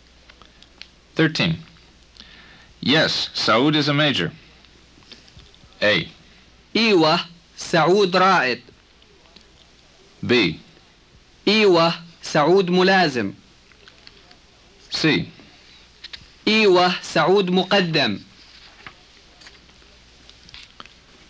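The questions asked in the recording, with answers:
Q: Yes, Saud is a major.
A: A: إيوه, سعود رائد.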